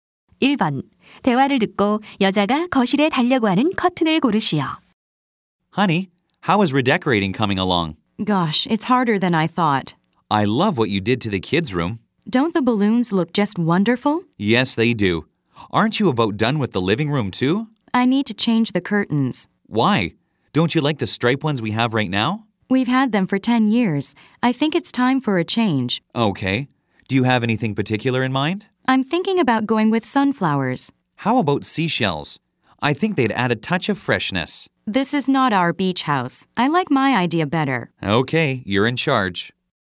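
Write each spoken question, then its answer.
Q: 대화를 듣고 여자가 거실에 달려고 하는 커튼을 고르시오.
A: 해바라기 무늬 커튼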